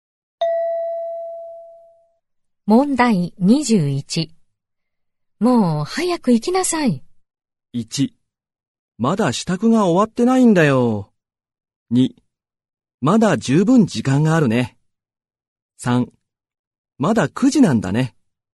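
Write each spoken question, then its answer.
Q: もう早く行きなさい。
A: 1: まだ支度が終わってないんだよ。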